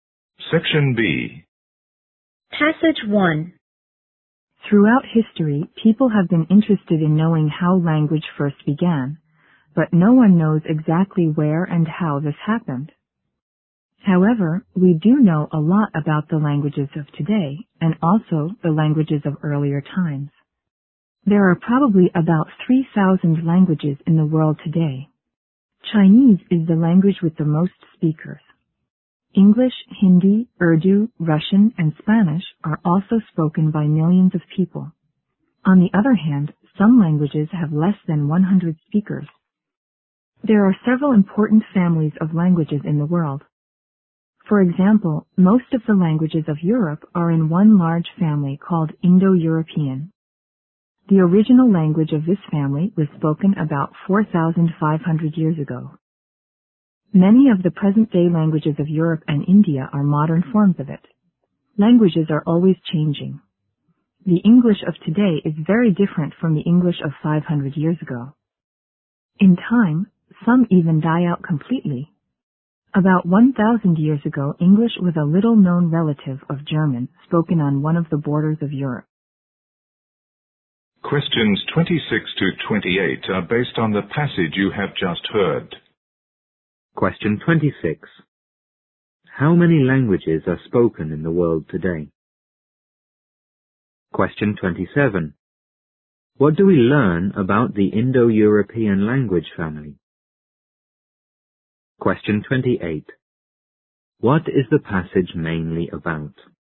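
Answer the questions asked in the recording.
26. About 3,000
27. Most European languages belong to it, and its original language was spoken about 4,500 years ago
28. The languages of the world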